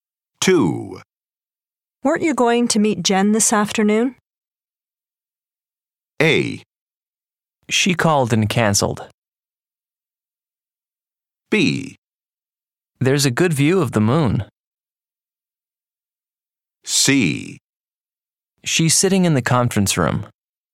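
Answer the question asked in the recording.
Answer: A: She called and cancelled.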